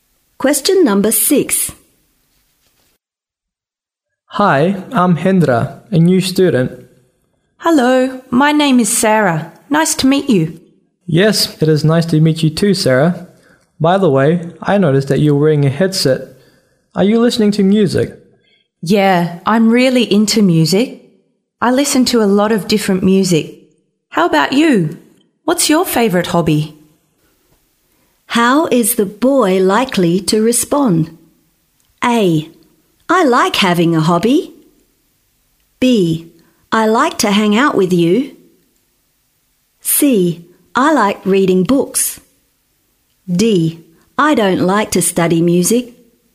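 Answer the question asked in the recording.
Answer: C: I like reading books.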